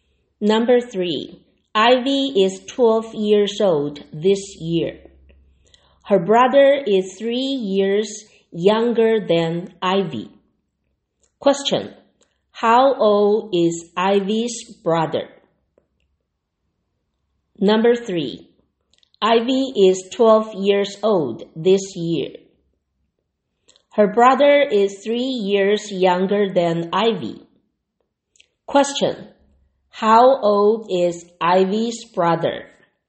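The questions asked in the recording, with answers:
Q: How old is Ivy's brother?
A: 9 years old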